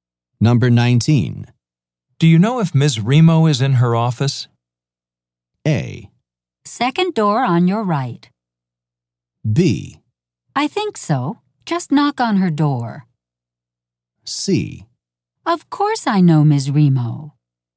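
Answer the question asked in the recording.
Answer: B: I think so. Just knock on her door.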